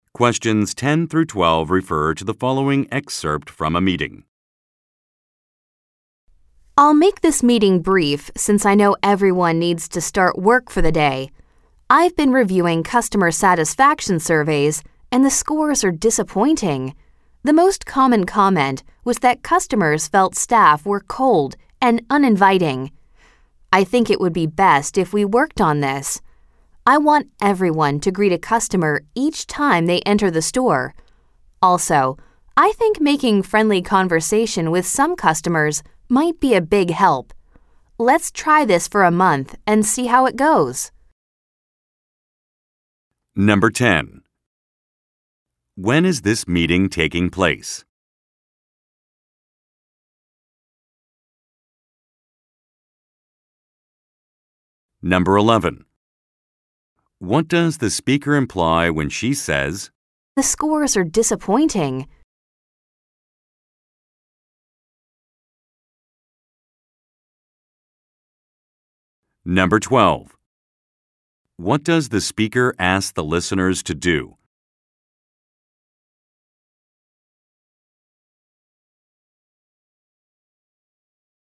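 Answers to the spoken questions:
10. Before the workday starts
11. Customer service needs to improve
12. Greet each customer who enters the store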